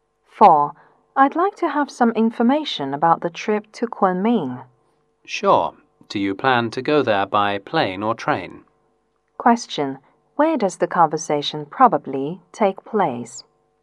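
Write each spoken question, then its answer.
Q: Where does the conversation probably take place?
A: At a travel agency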